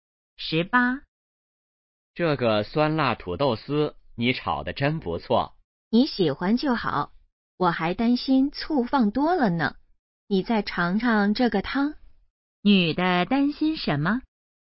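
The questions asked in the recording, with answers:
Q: 女的担心什么?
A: 醋放多了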